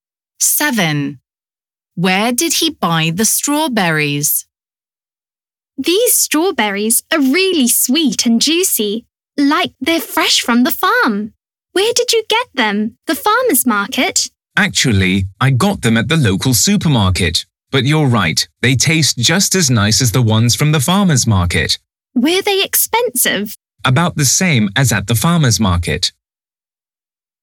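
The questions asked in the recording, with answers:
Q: Where did he buy the strawberries?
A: at the local supermarket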